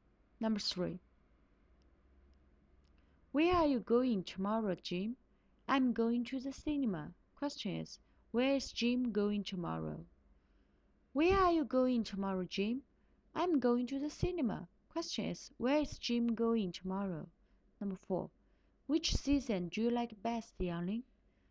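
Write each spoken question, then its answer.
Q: where is Jim going tomorrow?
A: To the cinema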